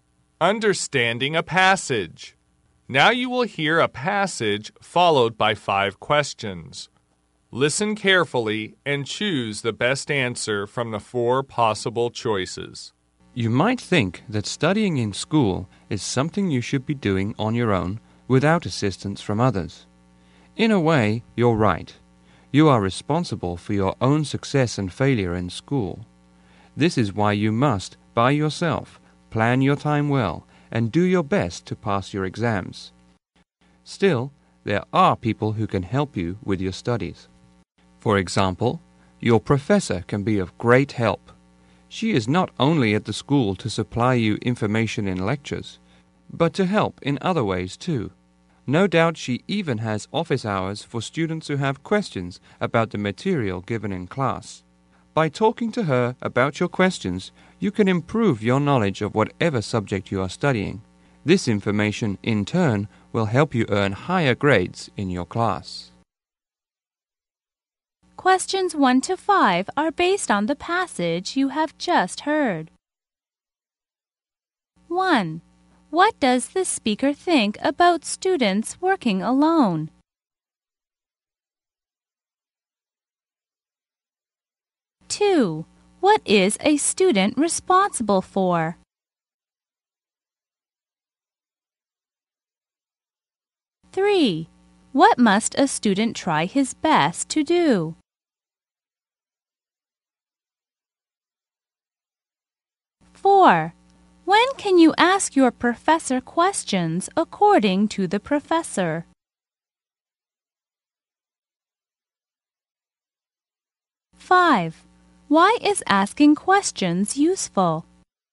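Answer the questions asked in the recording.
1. They're partly right, but others can help.
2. His own success and failure in school.
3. Pass his exams.
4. During office hours.
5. It improves your knowledge and helps you earn higher grades.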